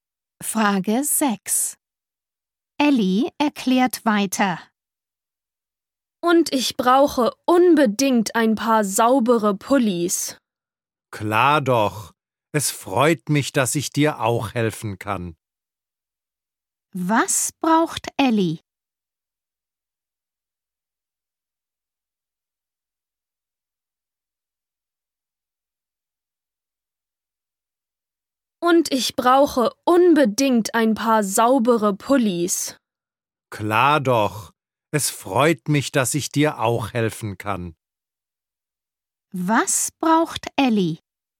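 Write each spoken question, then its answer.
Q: Was braucht Ellie?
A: saubere Pullis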